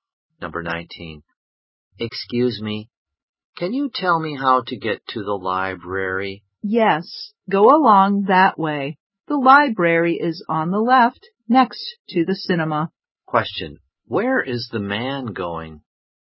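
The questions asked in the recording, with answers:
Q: Where is the man going?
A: To the library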